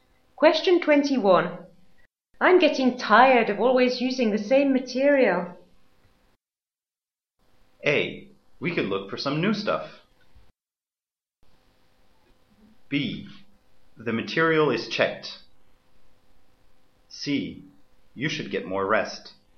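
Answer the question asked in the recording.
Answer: A: We could look for some new stuff.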